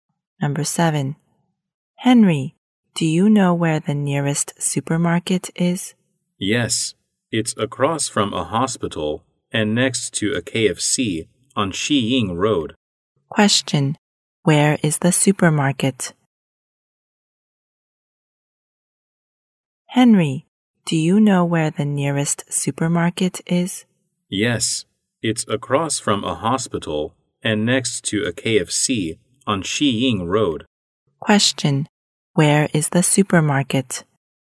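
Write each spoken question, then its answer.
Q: Question, where is the supermarket?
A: Across from a hospital and next to a KFC on Xiying Road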